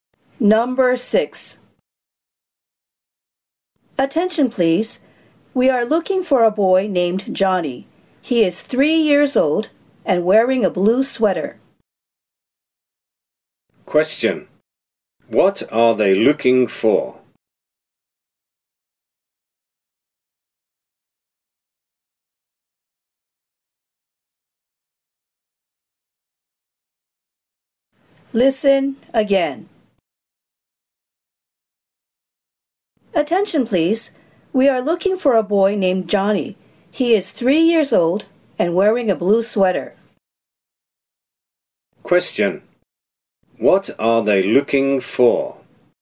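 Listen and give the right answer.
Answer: A 3-year-old boy named Johnny in a blue sweater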